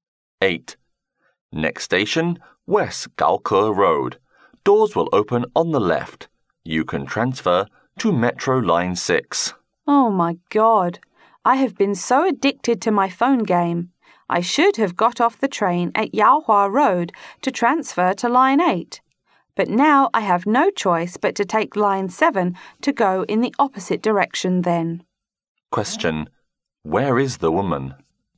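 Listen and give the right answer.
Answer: On a metro train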